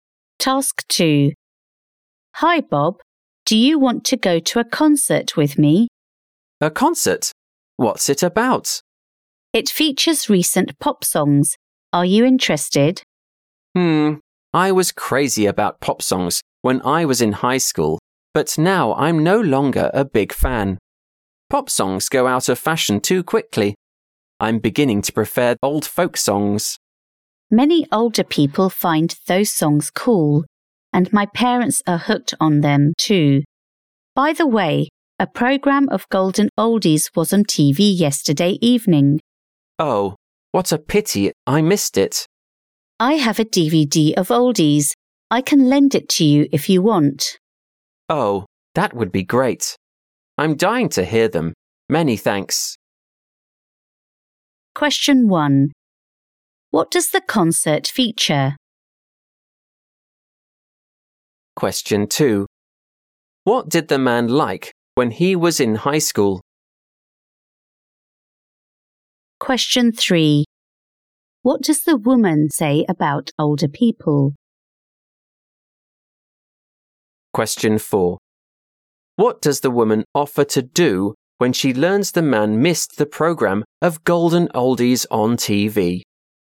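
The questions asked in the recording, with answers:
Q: What does the concert feature?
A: Recent pop songs

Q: What did the man like when he was in high school?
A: Pop songs

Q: What does the woman offer to do when she learns the man missed the program of Golden Oldies on TV?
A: Lend him her DVD of Oldies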